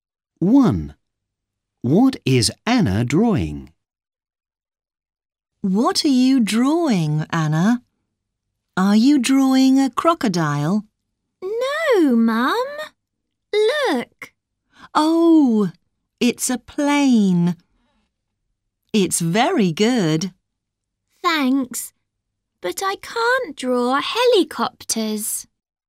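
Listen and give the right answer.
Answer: a plane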